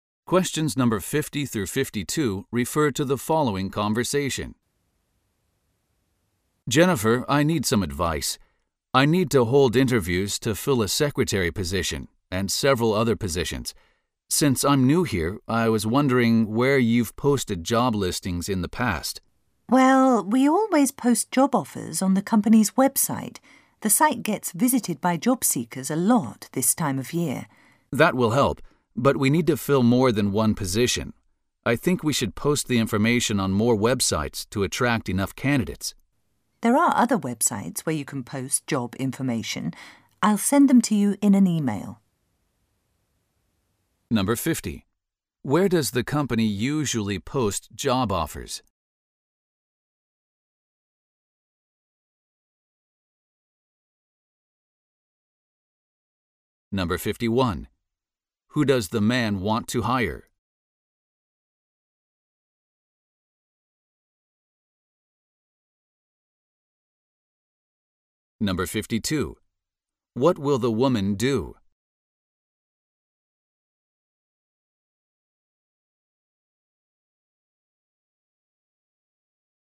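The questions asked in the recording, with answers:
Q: Where does the company usually post job offers?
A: On the company's website

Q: Who does the man want to hire?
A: A secretary (among other positions)

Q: What will the woman do?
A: Email him a list of other job websites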